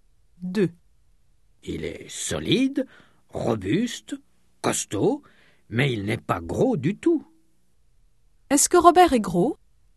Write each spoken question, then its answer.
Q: Est-ce que Robert est gros ?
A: Non, il n'est pas gros du tout.